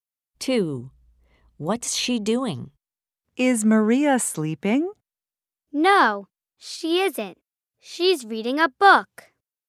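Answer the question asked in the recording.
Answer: She's reading a book.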